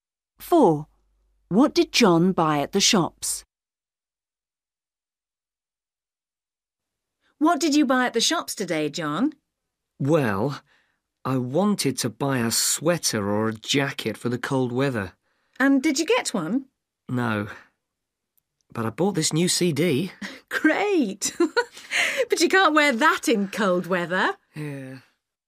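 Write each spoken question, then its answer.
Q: What did John buy at the shops?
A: A CD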